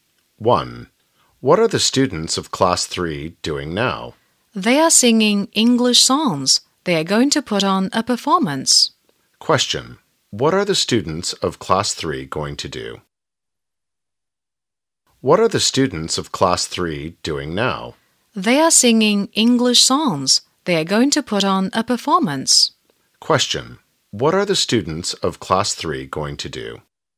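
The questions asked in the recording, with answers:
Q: What are the students of Class 3 going to do?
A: Put on a performance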